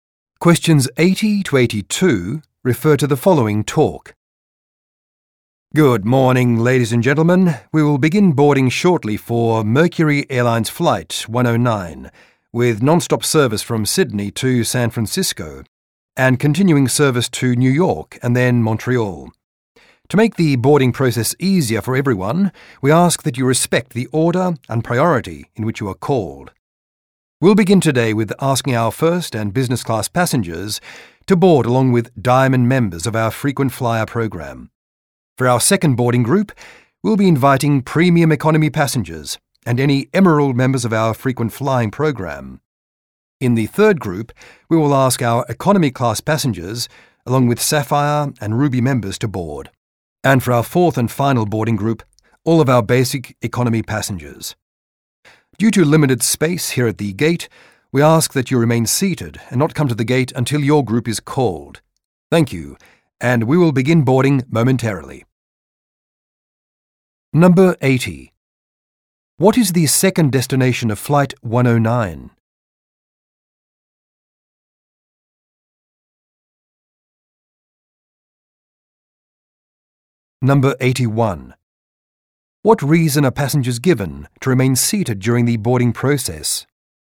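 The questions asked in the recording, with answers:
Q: What is the second destination of Flight 109?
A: New York

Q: What reason are passengers given to remain seated during the boarding process?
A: Limited space at the gate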